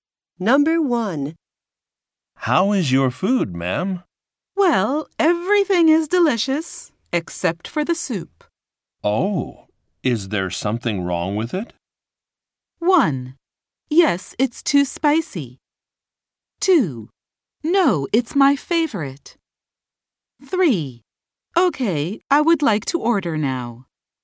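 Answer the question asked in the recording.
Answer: 1: Yes, it's too spicy.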